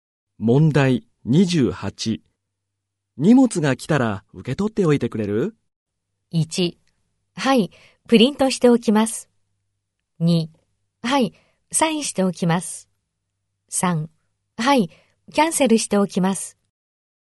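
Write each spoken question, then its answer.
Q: 荷物が来たら受け取っておいてくれる?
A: 2: はい、サインしておきます。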